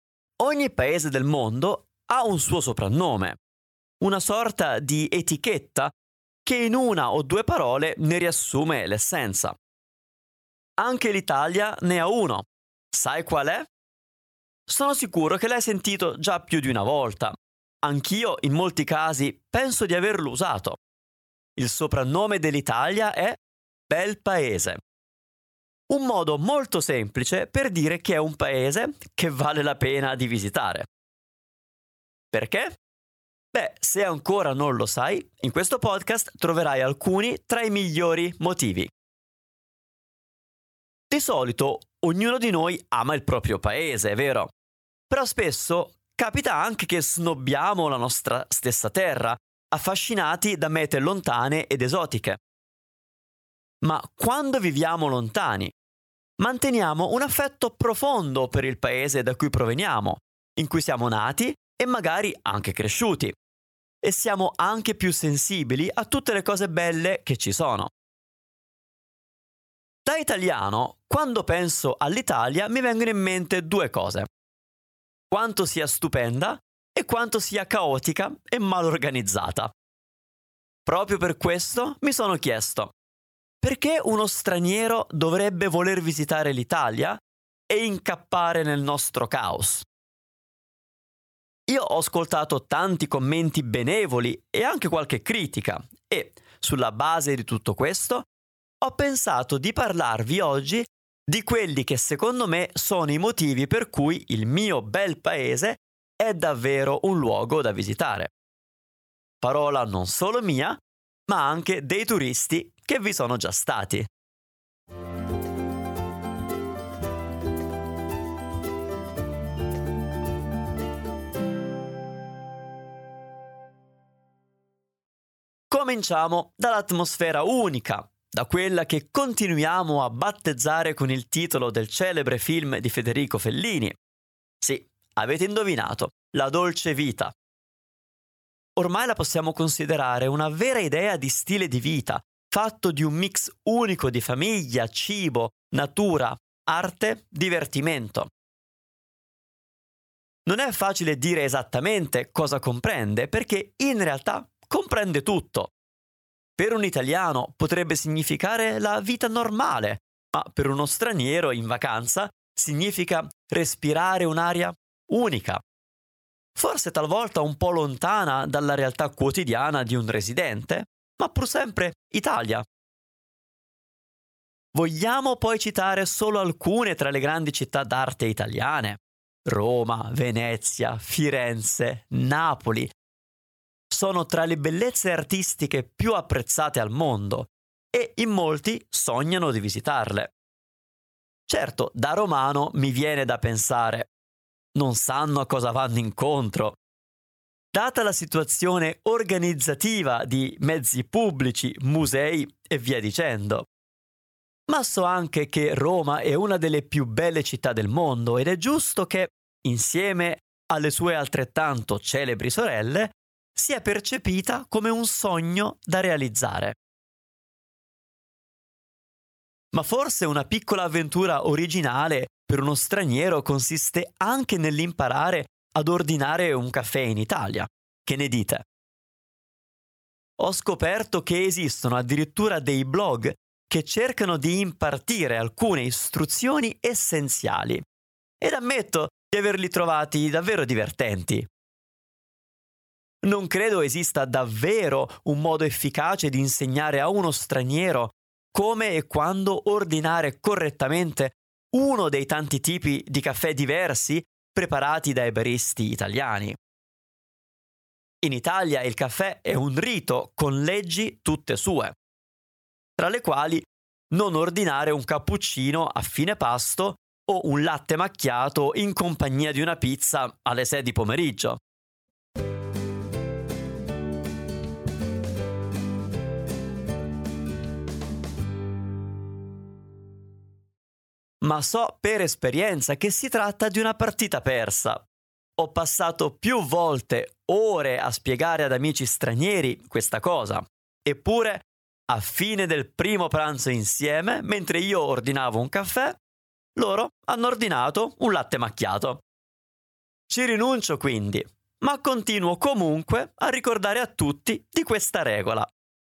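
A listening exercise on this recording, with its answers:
Here are your TRUE/ FALSE Comprehension questions.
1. Solitamente tutti amano il proprio Paese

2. L'Italia, a differenza di altri Paesi, non ha un soprannome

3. Per molti stranieri visitare Roma rappresenta un sogno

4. Roma non merita di esser visitata perché è una città caotica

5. In Italia anche ordinare un caffè può essere un'avventura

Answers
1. Vero
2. Falso
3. Vero
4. Falso
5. Vero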